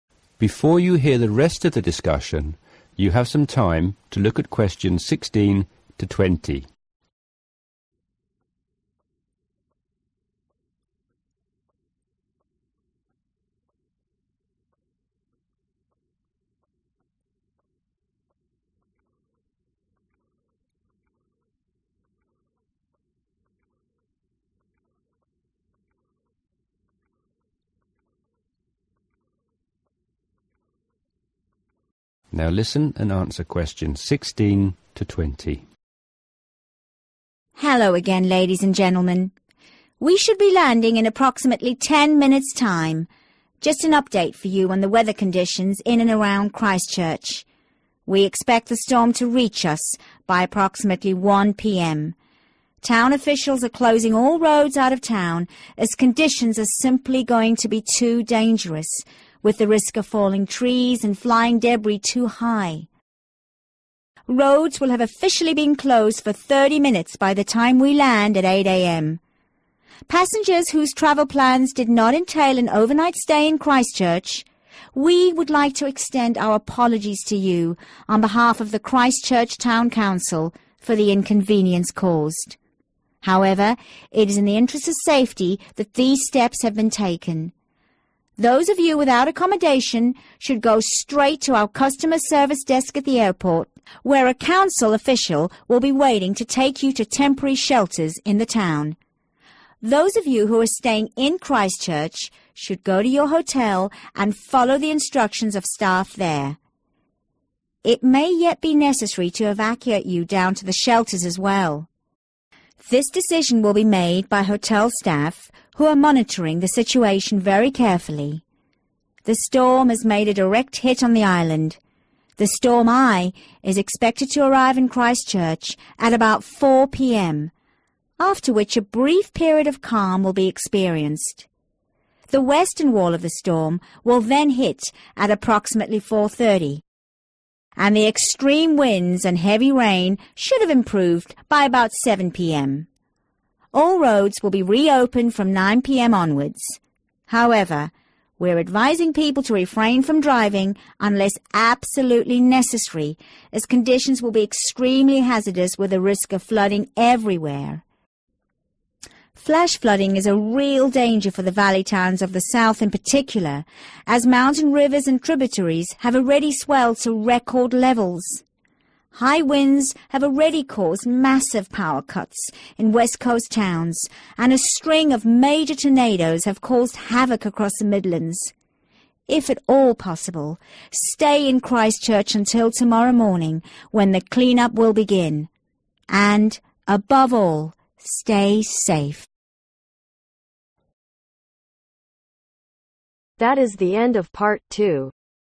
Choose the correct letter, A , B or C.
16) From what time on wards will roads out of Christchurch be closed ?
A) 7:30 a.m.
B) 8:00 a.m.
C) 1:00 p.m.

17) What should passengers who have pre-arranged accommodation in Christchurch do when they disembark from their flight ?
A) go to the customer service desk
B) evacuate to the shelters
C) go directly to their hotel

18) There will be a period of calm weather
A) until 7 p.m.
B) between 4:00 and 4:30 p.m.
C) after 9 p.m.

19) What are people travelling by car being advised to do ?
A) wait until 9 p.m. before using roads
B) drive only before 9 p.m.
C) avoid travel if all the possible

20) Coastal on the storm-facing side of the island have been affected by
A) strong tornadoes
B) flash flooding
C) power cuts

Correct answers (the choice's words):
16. 7:30 a.m.
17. go directly to their hotel
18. between 4:00 and 4:30 p.m.
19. avoid travel if all the possible
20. power cuts